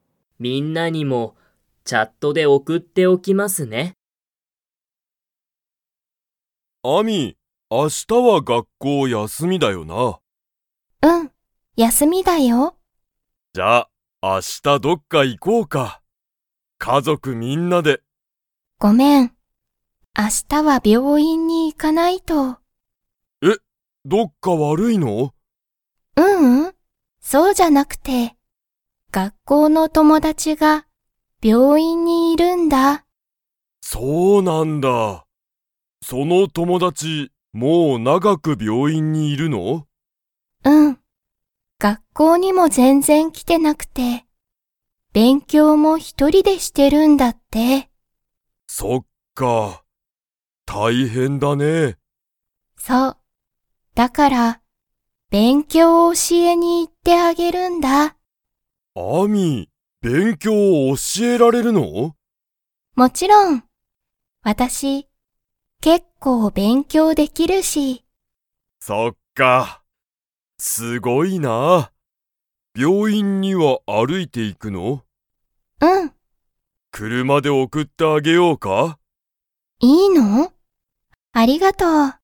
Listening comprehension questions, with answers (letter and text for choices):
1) アミは、明日あした、家族かぞくみんなとどっかに行いきますか?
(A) はい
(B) いいえ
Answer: (B) いいえ

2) アミは、結構けっこう____。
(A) 病院びょういんに行いく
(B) どっか悪わるい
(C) 教おしえに行いけない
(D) 勉強べんきょうができる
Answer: (D) 勉強べんきょうができる

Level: Level 2